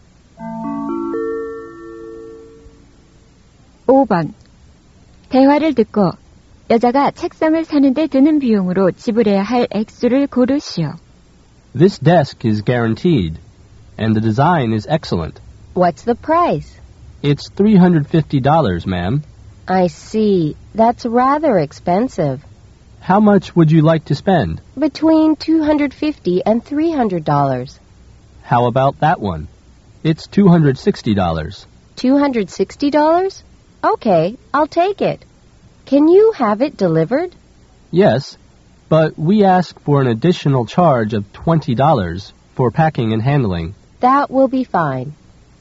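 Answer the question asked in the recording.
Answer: $280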